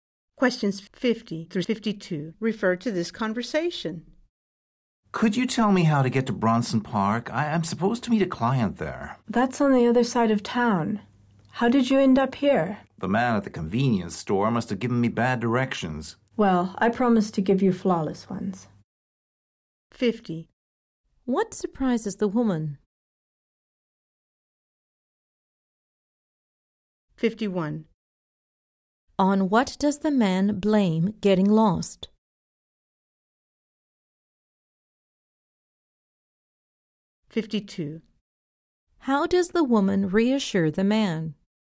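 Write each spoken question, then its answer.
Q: On what does the man blame getting lost?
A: Bad directions from the convenience store man

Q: How does the woman reassure the man?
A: She promises flawless directions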